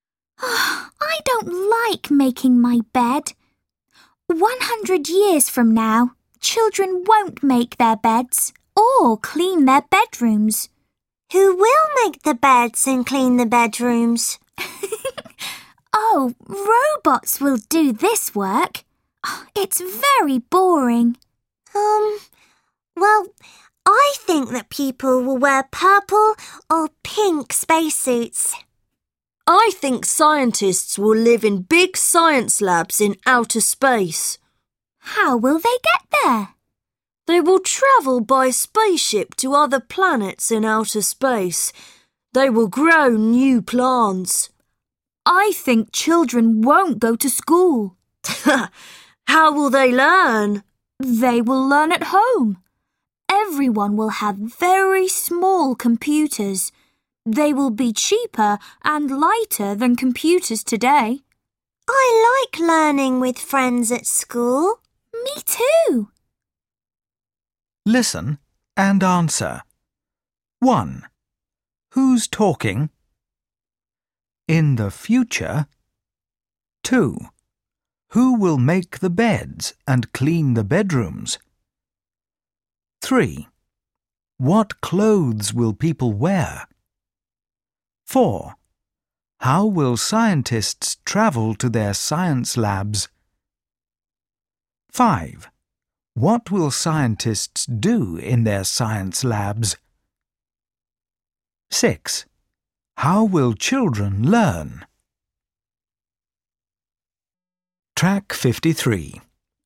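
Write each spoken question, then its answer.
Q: Who will make the beds and clean the bedrooms?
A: Robots

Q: What clothes will people wear?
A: Purple or pink spacesuits

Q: How will scientists travel to their science labs?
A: By spaceship

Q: What will scientists do in their science labs?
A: Grow new plants

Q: How will children learn?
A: At home with very small computers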